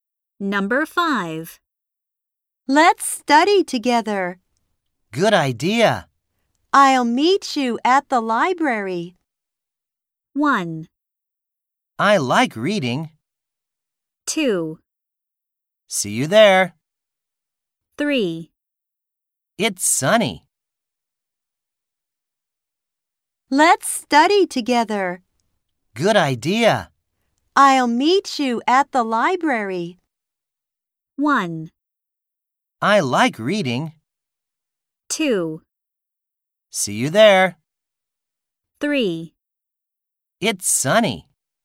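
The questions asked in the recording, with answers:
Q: I'll meet you at the library.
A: 2: See you there.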